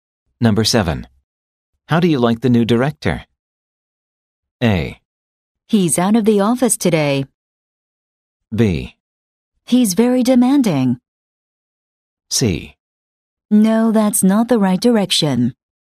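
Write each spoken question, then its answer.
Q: How do you like the new director?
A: B: He's very demanding.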